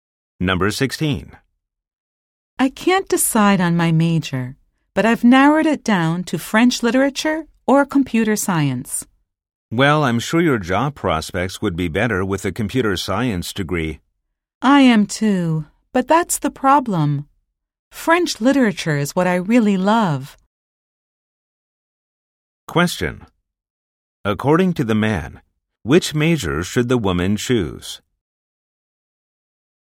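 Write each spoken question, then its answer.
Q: According to the man, which major should the woman choose?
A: Computer science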